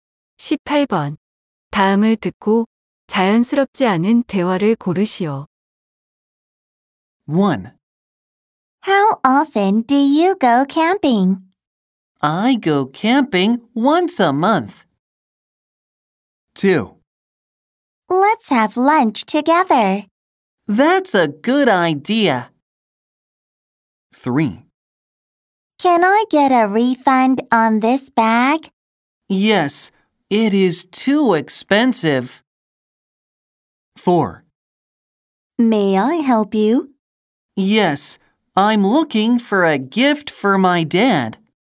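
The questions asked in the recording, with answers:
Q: 다음을 듣고 자연스럽지 않은 대화를 고르시오.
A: 3: Can I get a refund on this bag? / Yes, it is too expensive.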